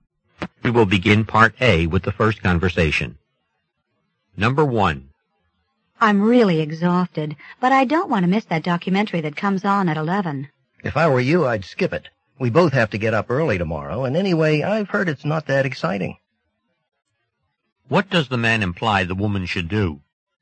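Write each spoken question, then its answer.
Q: What does the man imply the woman should do?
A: Skip the documentary and go to bed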